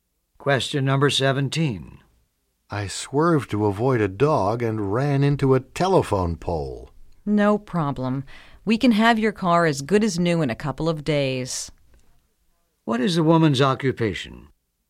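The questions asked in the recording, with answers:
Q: What is the woman's occupation?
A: Auto mechanic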